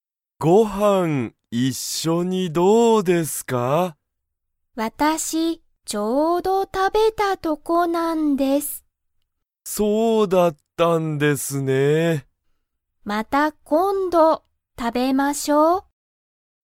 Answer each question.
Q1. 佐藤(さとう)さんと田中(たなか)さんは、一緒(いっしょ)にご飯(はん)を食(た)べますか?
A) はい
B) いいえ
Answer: B) いいえ

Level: Level 1

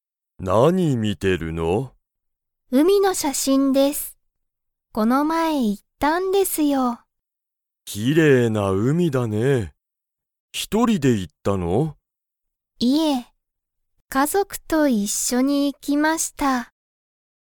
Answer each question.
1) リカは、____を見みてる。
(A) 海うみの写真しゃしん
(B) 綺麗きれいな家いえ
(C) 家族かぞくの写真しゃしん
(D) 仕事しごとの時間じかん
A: (A) 海うみの写真しゃしん

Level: Level 1

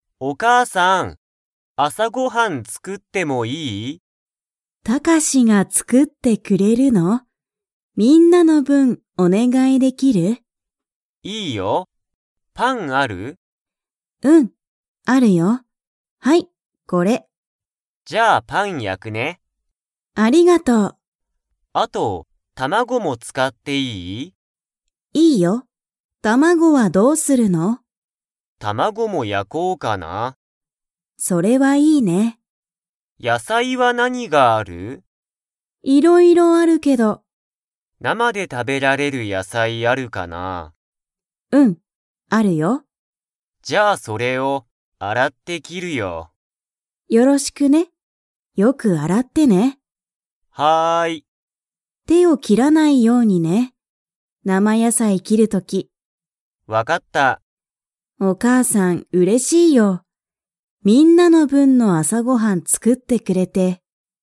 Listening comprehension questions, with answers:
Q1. タカシは、何なにを焼やきますか?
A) パン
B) 卵たまご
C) パンと卵たまご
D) パンと卵たまごと野菜やさい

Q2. タカシは、野菜やさいを 。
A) 洗あらう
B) 洗あらわない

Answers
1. C) パンと卵たまご
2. A) 洗あらう

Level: Level 4

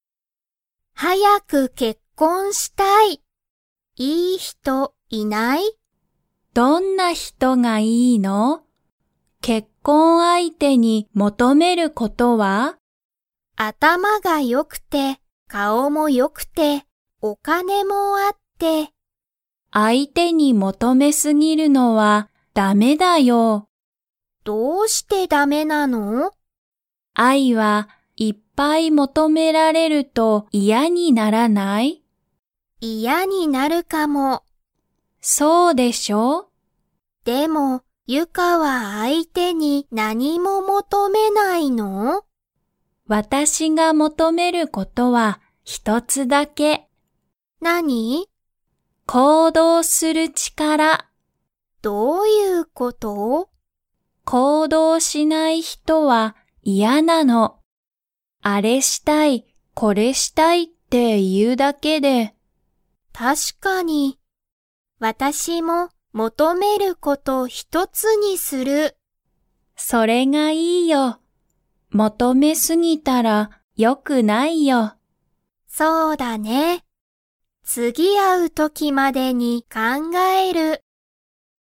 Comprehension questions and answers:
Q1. あいは 。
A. 結婚けっこんしてる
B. 結婚けっこんしてない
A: B. 結婚けっこんしてない

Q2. ゆかが、結婚けっこん相手あいてに求もとめることは何なんですか?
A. 頭あたまがいいこと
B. お金かねの力ちから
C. 面白おもしろいこと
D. 行動こうどうする力ちから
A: D. 行動こうどうする力ちから

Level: Level 3

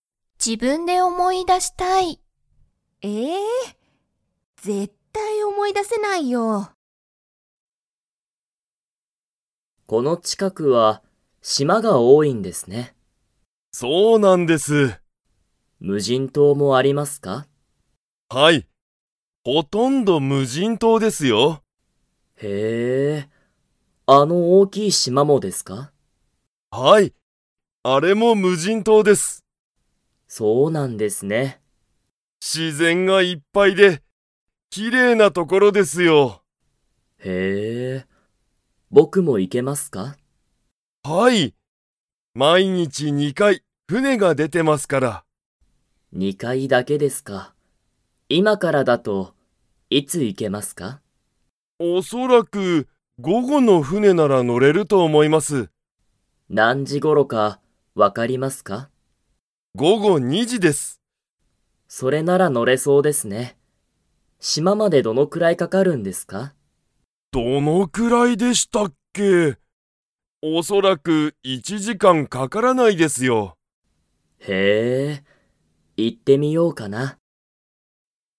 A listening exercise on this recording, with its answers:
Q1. 田中たなかさんは無人島むじんとうに 。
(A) 行いける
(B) 行いけない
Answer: (A) 行いける

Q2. 午後ごごの船ふねは、何時なんじに出でますか?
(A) 1時いちじ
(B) 2時にじ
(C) 3時さんじ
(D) 4時よじ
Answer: (B) 2時にじ

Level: Level 3

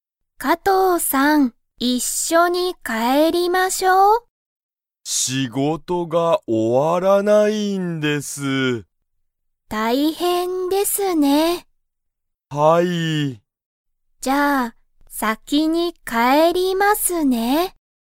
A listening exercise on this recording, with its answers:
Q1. 加藤(かとう)さんと山本(やまもと)さんは、一緒(いっしょ)に帰(かえ)りますか?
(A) はい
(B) いいえ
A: (B) いいえ

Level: Level 1

